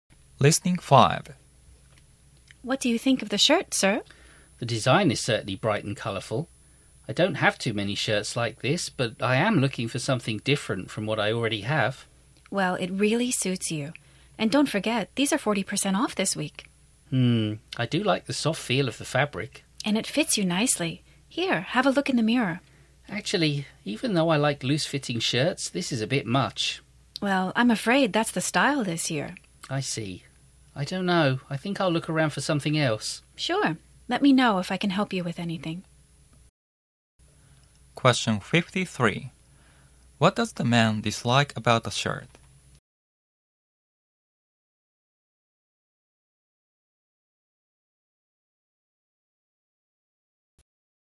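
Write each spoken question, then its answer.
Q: What does the man dislike about the shirt?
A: It is too loose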